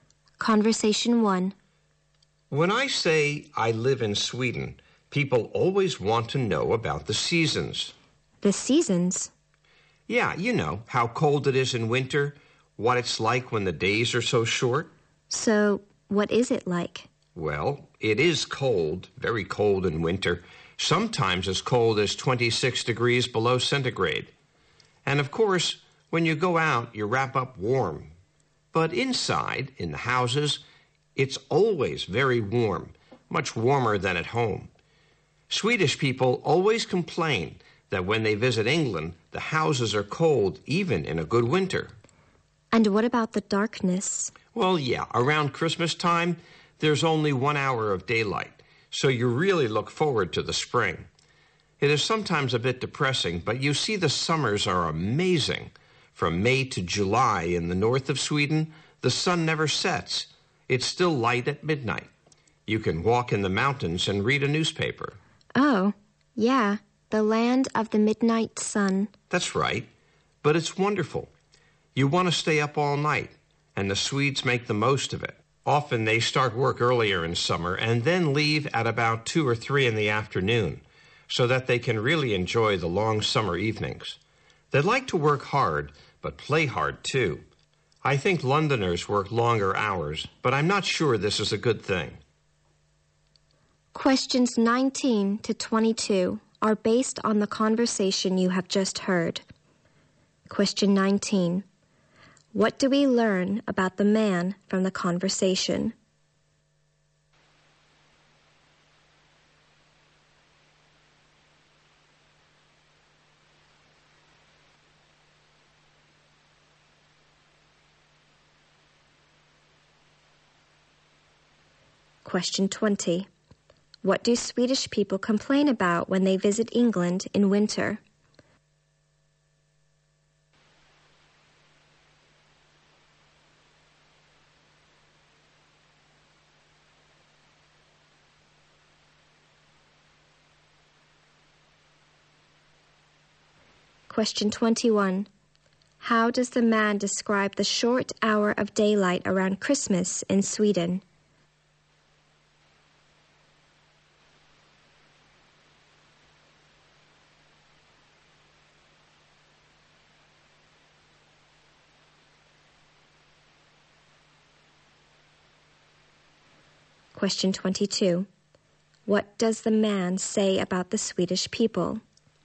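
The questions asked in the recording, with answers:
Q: What do Swedish people complain about when they visit England in winter?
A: The houses are cold

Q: How does the man describe the short hour of daylight around Christmas in Sweden?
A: It is sometimes a bit depressing

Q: What does the man say about the Swedish people?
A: They work hard but play hard too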